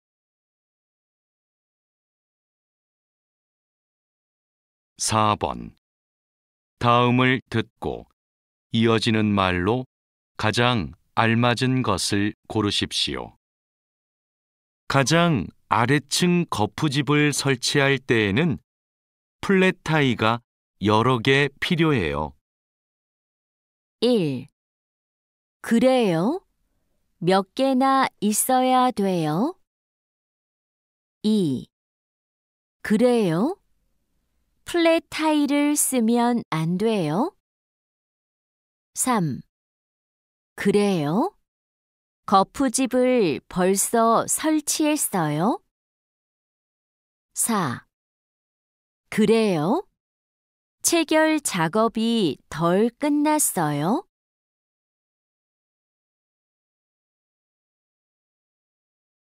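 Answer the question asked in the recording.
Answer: 1: 그래요? 몇 개나 있어야 돼요?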